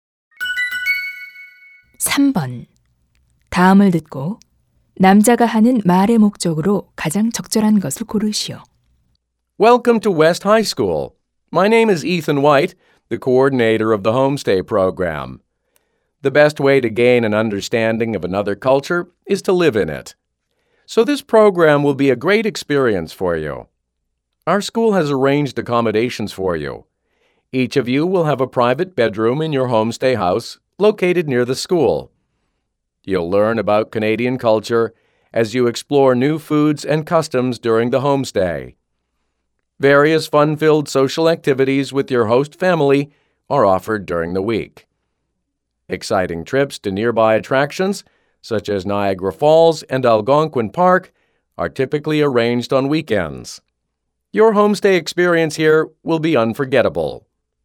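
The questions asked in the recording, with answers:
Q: 다음을 듣고 남자가 하는 말의 목적으로 가장 적절한 것을 고르시오.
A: 홈스테이 프로그램을 소개하려고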